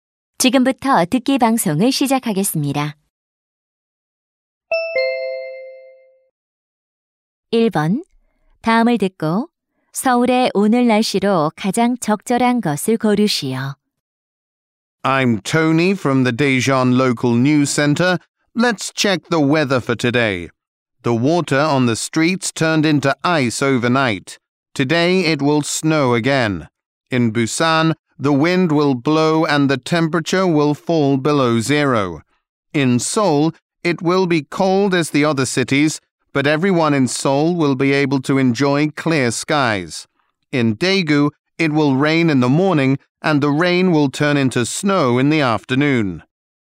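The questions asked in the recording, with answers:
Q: 다음을 듣고 서울의 오늘 날씨로 가장 적절한 것을 고르시오.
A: 춥지만 맑음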